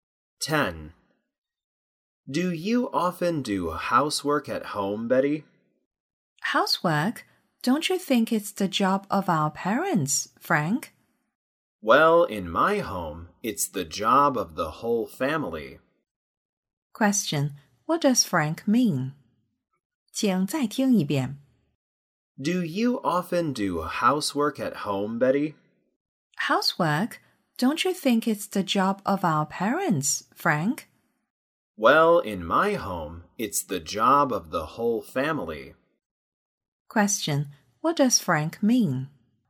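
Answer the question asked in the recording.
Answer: Housework should be done by the whole family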